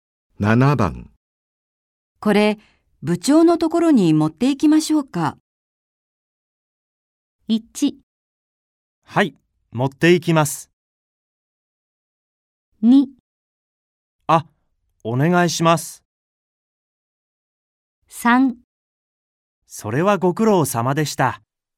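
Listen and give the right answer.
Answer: 2: あ、お願いします。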